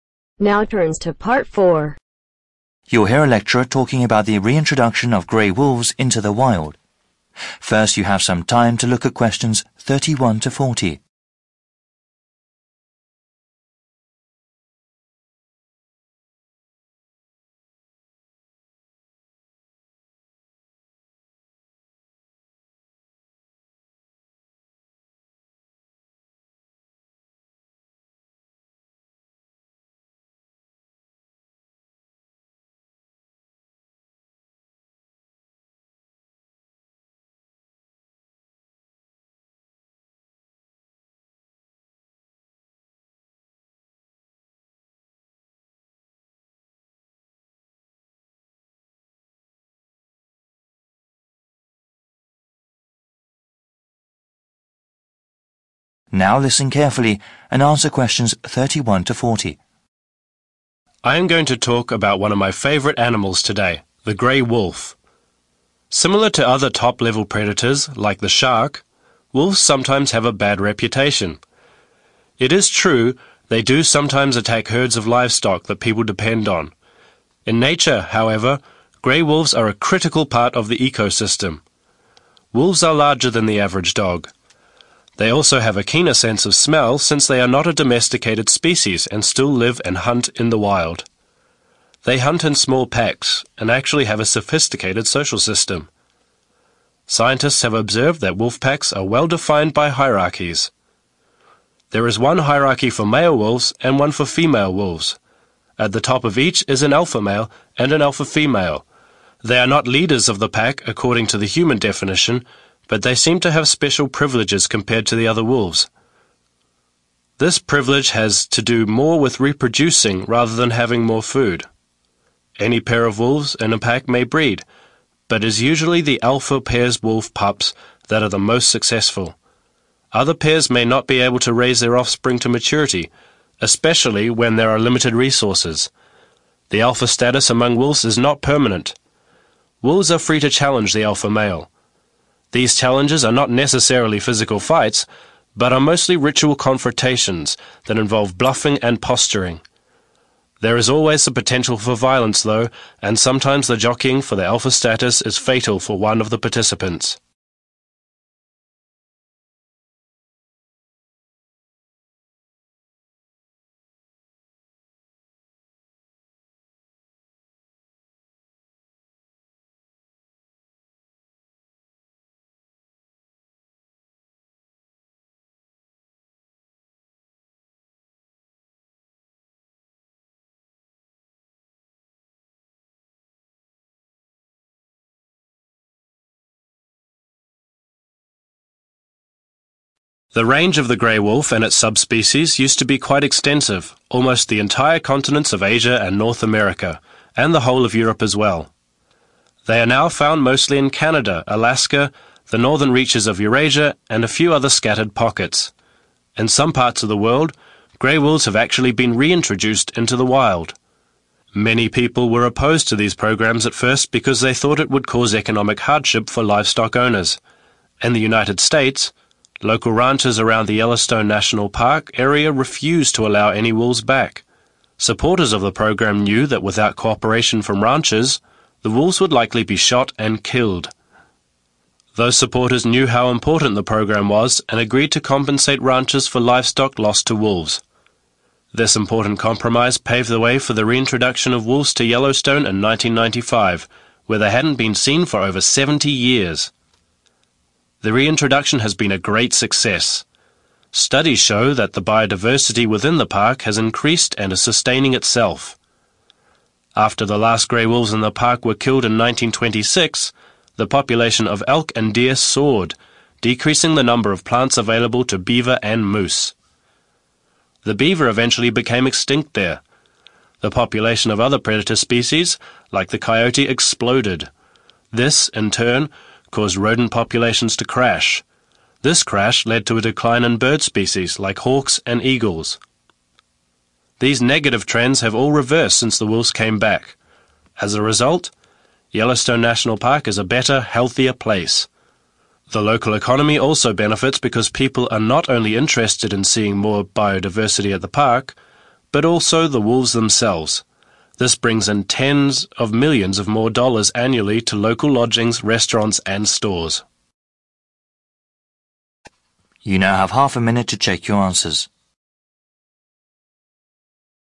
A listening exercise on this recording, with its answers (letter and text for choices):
Write NO MORE THAN TWO WORDS for each answer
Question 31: are actually a 31............. of the Earth's living system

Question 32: Wolves hunt is small groups and have a well-developed 32...............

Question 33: At the top of the hierarchy are an alpha male and an alpha 33.............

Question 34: The alpha pair's pups are usually the 34............... successful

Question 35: Challenges for leadership do not always lead to physical 35......... but are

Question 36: Gray wolves are now found only in Canada, Alaska, Northern Eurasia and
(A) many other places in the southern hemisphere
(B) a few other isolated areas in the world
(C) on the Indian subcontinent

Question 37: Supporters of the reintroduction program Agreed to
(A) give money to people whose cattle were at risk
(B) delay restoring the wolf population for several years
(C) fund more studies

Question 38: After reintroducing the wolves, bio diversity in Yellowstone Park increased and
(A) maintained itself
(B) fell soon aferwards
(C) stayed exactly the same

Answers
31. critical part
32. social system
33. female
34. most
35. fights
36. (B) a few other isolated areas in the world
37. (A) give money to people whose cattle were at risk
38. (A) maintained itself